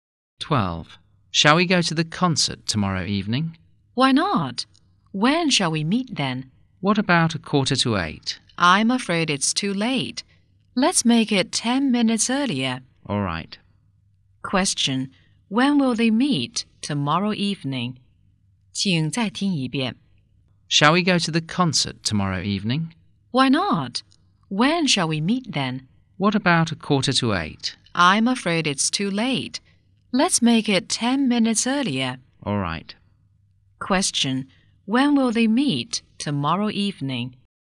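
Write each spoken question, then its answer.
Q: Question, when will they meet tomorrow evening?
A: At 7:35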